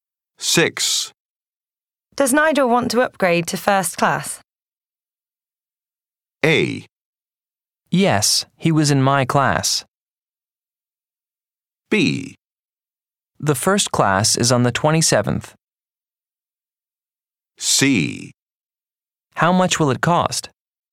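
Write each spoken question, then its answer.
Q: Does Nigel want to upgrade to first class?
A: C: How much will it cost?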